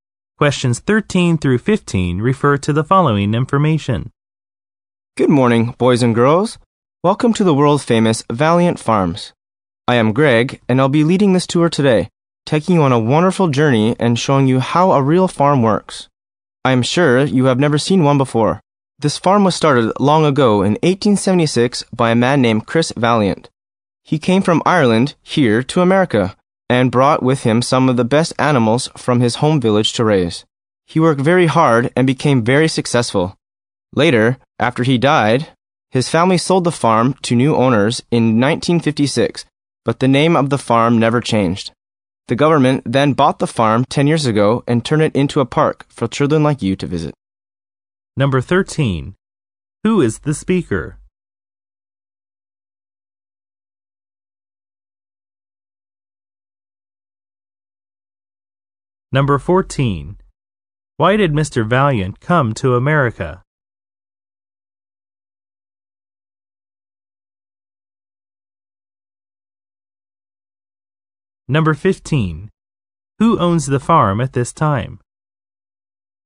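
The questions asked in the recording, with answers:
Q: Who is the speaker?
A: A tour guide at the farm

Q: Who owns the farm at this time?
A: The government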